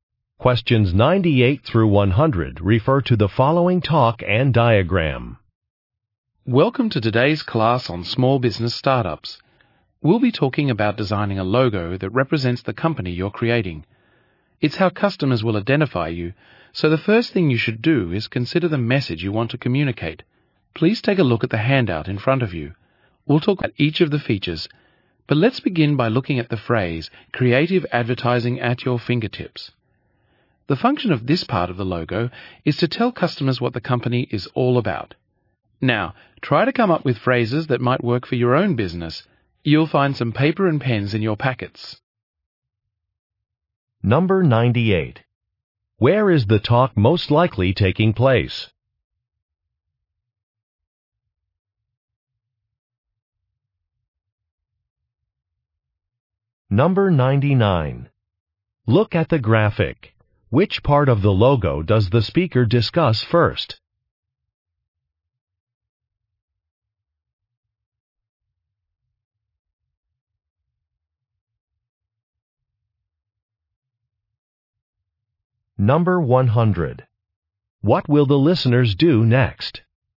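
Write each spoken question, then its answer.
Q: Where is the talk most likely taking place?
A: In a small business startup class

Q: What will the listeners do next?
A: Come up with phrases for their own business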